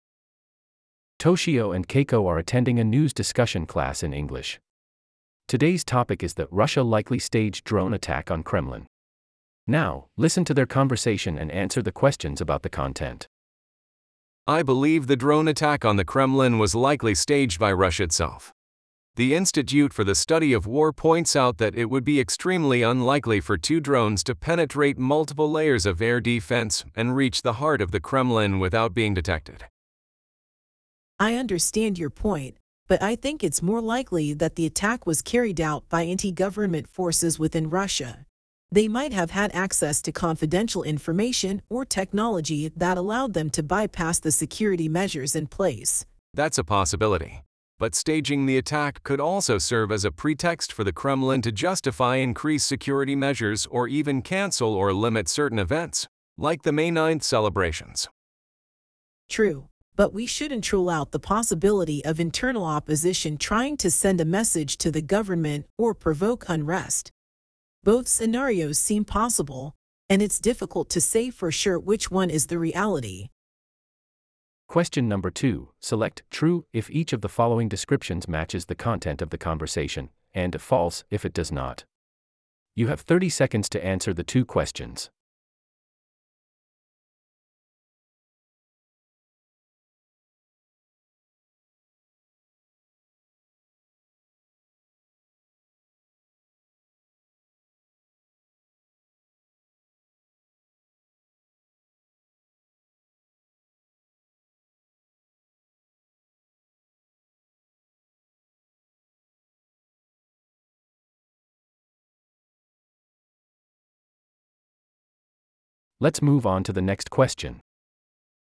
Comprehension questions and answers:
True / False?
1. Toshio thinks that the drone attack on the Kremlin was carried out by anti-government forces within Russia.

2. Keiko suggests that internal opposition might have carried out the attack to send a message to the government or provoke unrest.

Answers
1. False
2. True

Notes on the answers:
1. I believe the drone attack on the Kremlin was likely staged by Russia itself.

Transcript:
Toshio and Keiko are attending a news discussion class in English. Today's topic is the "Russia likely staged drone attack on Kremlin".
Now, listen to their conversation and answer the questions about the content.
Toshio: I believe the drone attack on the Kremlin was likely staged by Russia itself. The Institute for the Study of War points out that it would be extremely unlikely for two drones to penetrate multiple layers of air defense and reach the heart of the Kremlin without being detected.
Keiko: I understand your point, but I think it's more likely that the attack was carried out by anti-government forces within Russia. They might have had access to confidential information or technology that allowed them to bypass the security measures in place.
Toshio: That's a possibility, but staging the attack could also serve as a pretext for the Kremlin to justify increased security measures or even cancel or limit certain events, like the May 9th celebrations.
Keiko: True, but we shouldn't rule out the possibility of internal opposition trying to send a message to the government or provoke unrest. Both scenarios seem possible, and it's difficult to say for sure which one is the reality.
Question : True or False
2: Select 'True' if each of the following descriptions matches the content of the conversation, and 'False' if it does not. You have 30 seconds to answer the two questions.